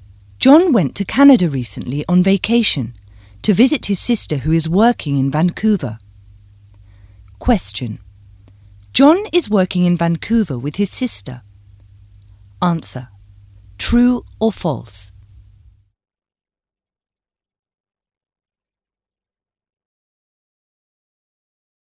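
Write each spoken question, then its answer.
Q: John is working in Vancouver with his sister. Answer. True or false?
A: False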